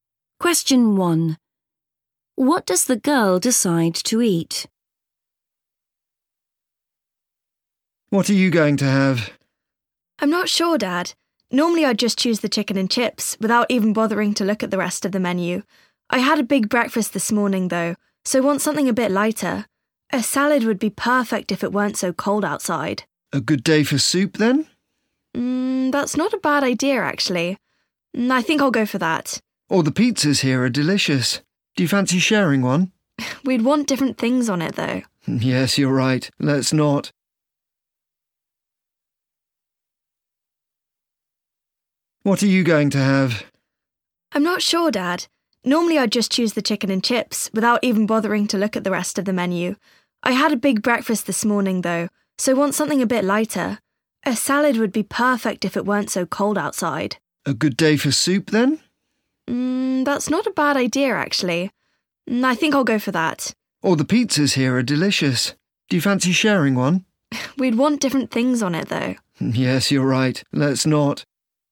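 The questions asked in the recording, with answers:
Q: What does the girl decide to eat?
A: soup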